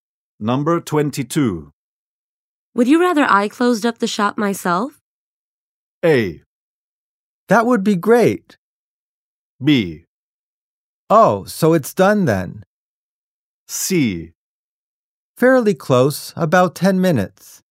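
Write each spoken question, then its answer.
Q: Would you rather I closed up the shop myself?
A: A: That would be great.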